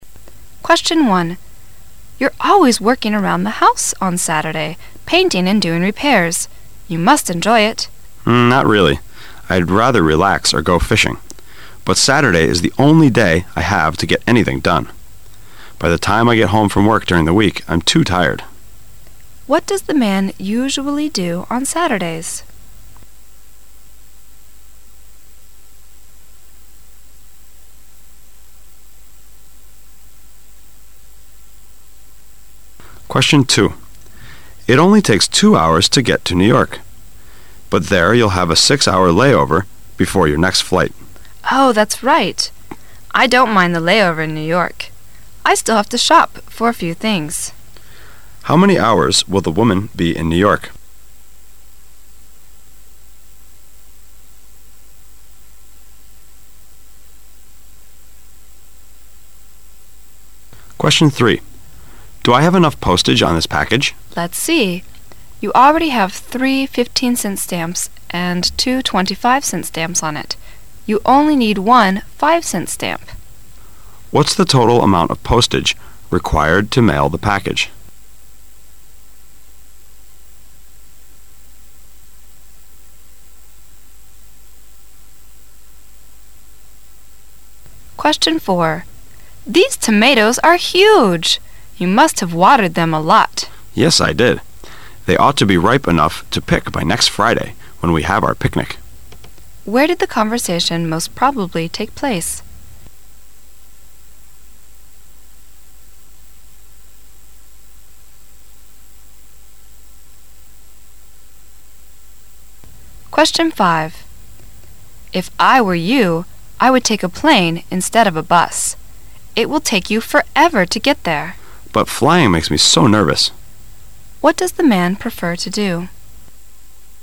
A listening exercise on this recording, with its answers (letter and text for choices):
Section A Directions: In this section, you will hear 10 short conversations. At the end of each conversation, a question will be asked about what was said. Both the conversation and the question will be spoken only once. After each question there will be a pause. During the pause, you must read the four choices marked A), B), C) and D), and decide which is the best answer. Then mark the corresponding letter on the Answer Sheet with a single line through the centre.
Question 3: What is the total amount of postage required to mail the package?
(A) '5.45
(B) '1.00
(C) '0.95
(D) '2.05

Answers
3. (B) '1.00

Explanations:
M: Do I have enough postage on this package? W: Let's see. You already have three fifteen-cent stamps and two twenty-five-cent stamps on it. You only need one five-cent stamp. Q: What is the total amount of postage required to mail the package?